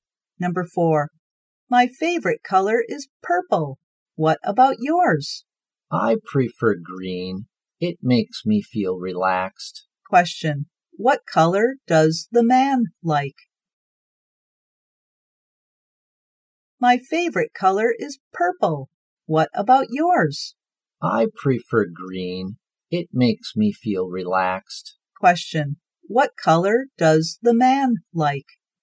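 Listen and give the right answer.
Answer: Green.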